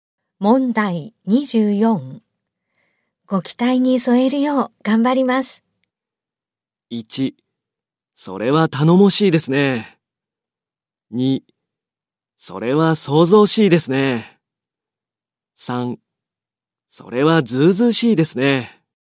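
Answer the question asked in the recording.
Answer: 1: それは頼もしいですね。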